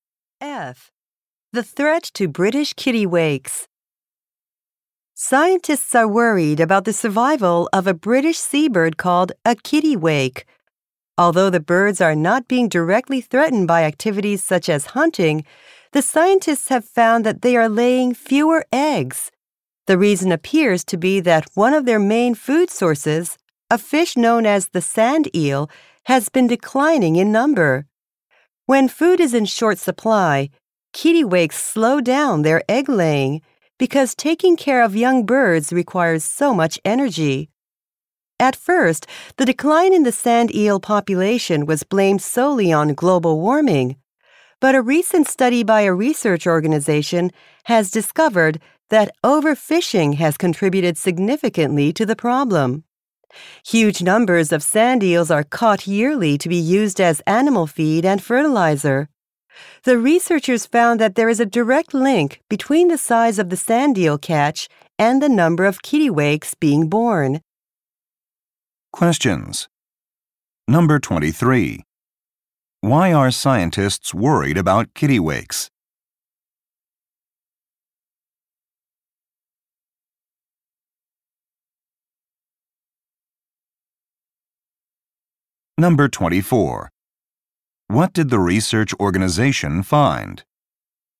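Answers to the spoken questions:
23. They are laying fewer eggs.
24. Overfishing of sand eels has contributed significantly to the problem.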